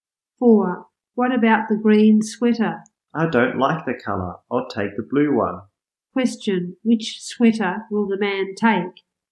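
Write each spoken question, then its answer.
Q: Which sweater will the man take?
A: The blue one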